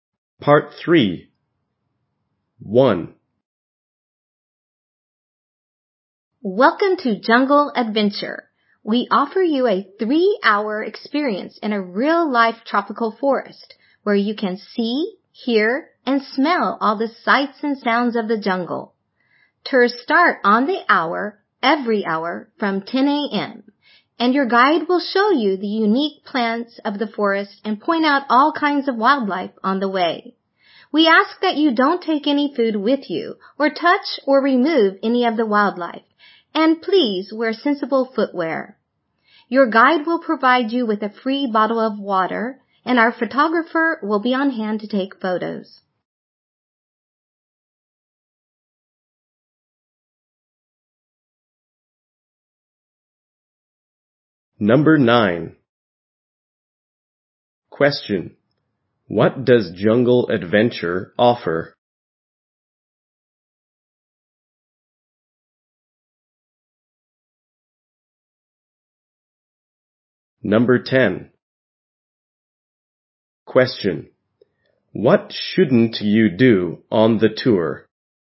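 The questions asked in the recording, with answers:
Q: What shouldn't you do on the tour?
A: Take food with you or touch or remove wildlife.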